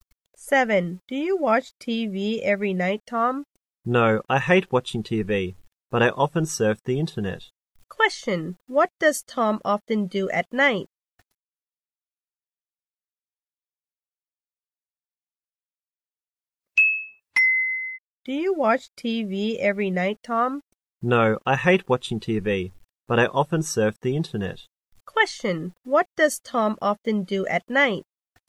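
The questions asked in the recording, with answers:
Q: What does Tom often do at night?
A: He surfs the internet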